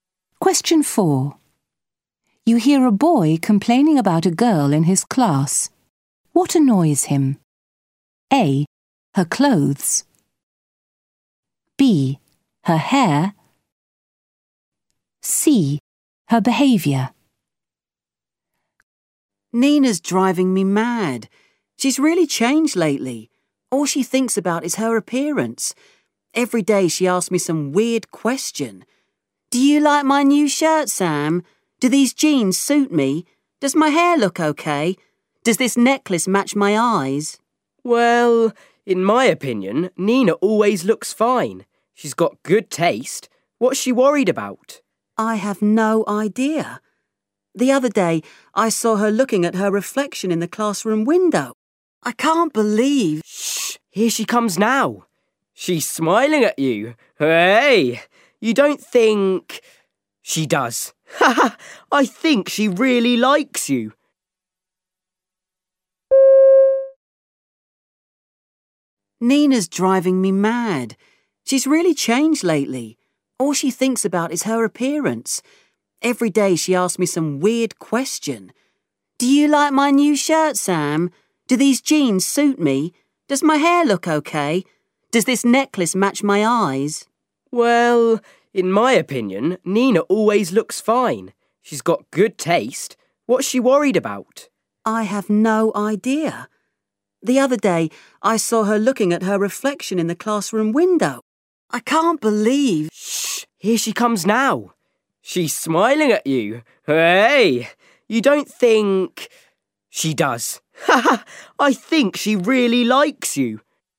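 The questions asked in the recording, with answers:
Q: What annoys him?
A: C: Her behaviour.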